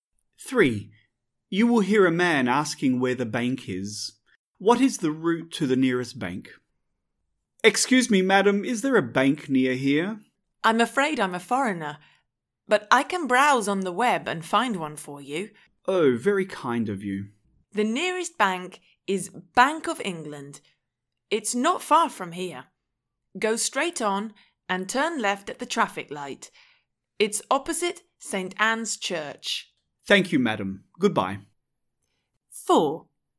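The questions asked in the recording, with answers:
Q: What is the route to the nearest bank?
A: Go straight on and turn left at the traffic light; it's opposite St. Anne's Church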